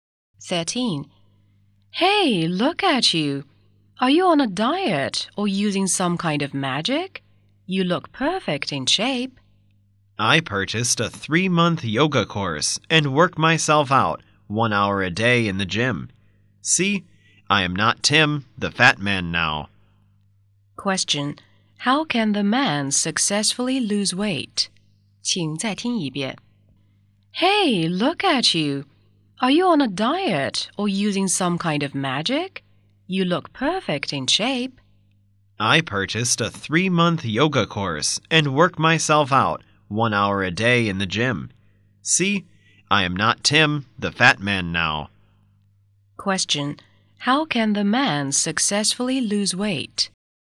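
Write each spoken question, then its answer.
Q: How can the man successfully lose weight?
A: By doing yoga and working out in the gym one hour a day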